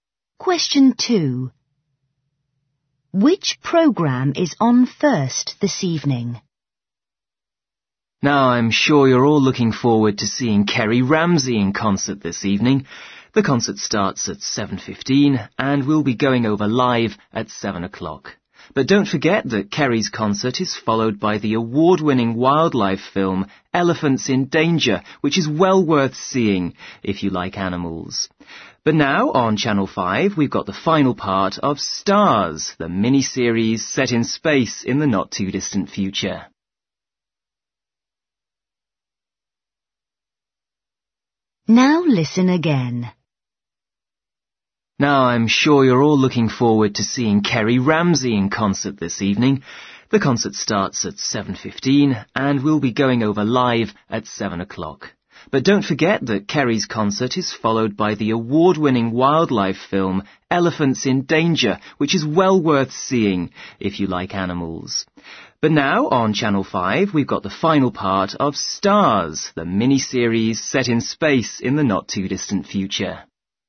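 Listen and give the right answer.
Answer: Stars, the space mini-series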